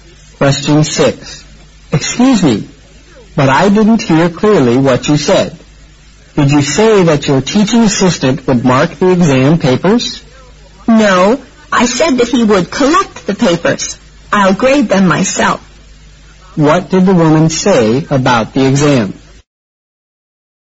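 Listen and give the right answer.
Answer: She will grade the papers herself; the assistant will only collect them.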